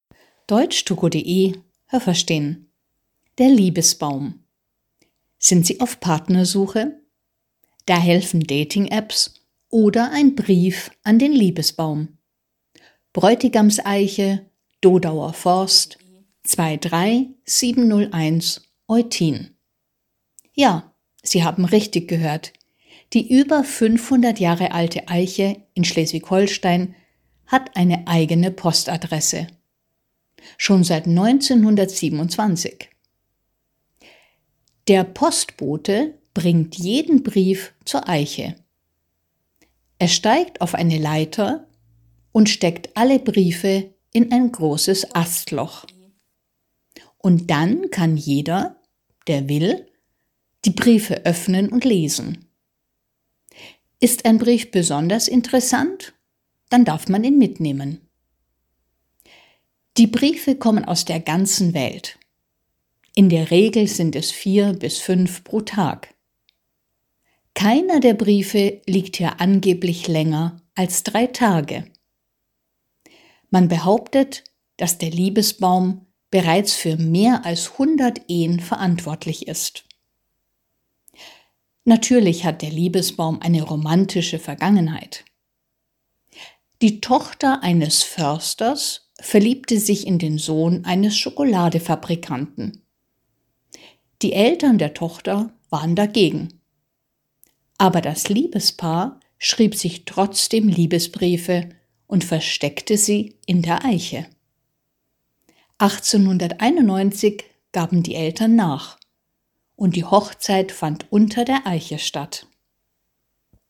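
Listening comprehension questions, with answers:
Welche Präposition passt?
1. Die Eiche ist _____ 500 Jahre alt.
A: über

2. Die Eiche hat _____ 1927 eine eigene Postadresse.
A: seit

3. Der Postbote steigt _____ eine Leiter.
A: auf

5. Die Briefe kommen _____ der ganzen Welt.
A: aus

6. Der Liebesbaum ist angeblich _____ mehr als 100 Ehen verantwortlich.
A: für

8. 1891 fand die Hochzeit _____ der Eiche statt.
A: unter

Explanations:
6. Feste Verbindung: verantwortlich sein für + Akkusativ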